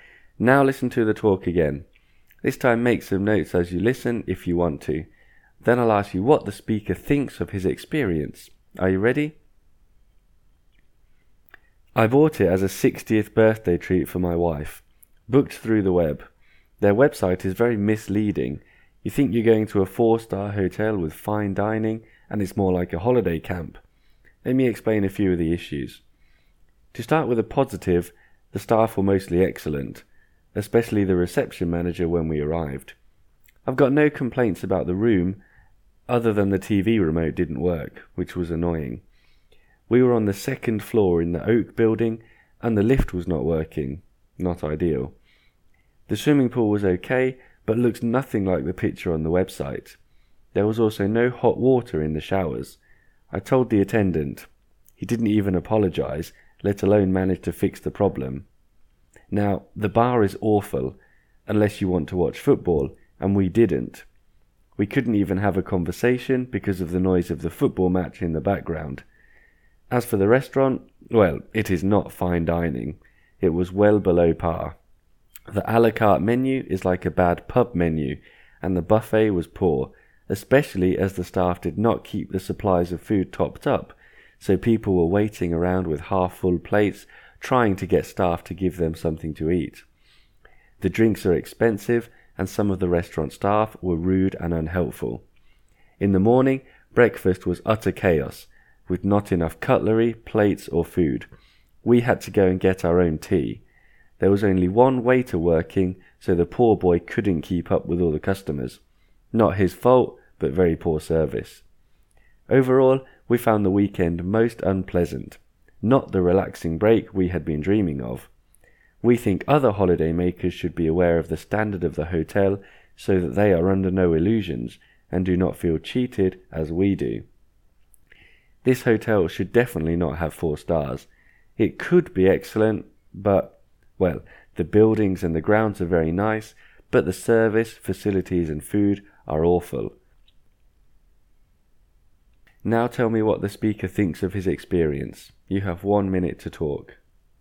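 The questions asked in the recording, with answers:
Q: Now tell me what the speaker thinks of his experience.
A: He thought it was unpleasant and disappointing: he felt cheated because the website was misleading, and the service, facilities and food were awful, although the staff at reception, the buildings and the grounds were nice.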